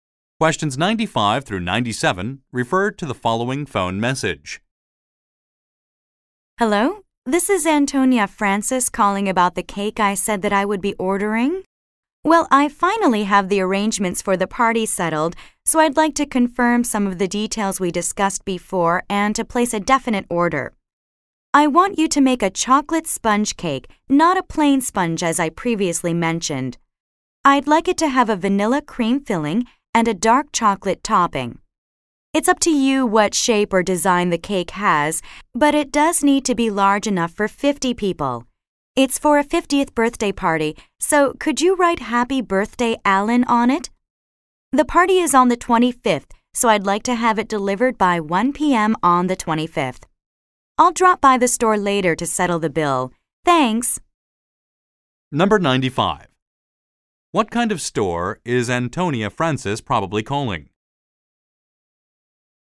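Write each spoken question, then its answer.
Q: What kind of store is Antonia Francis probably calling?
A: A bakery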